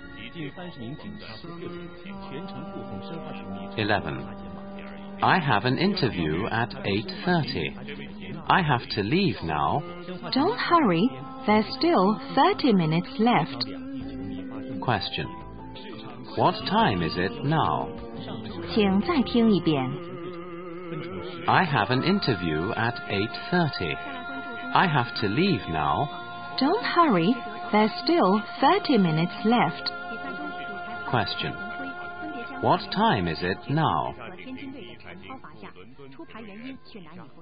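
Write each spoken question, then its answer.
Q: What time is it now?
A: 8:00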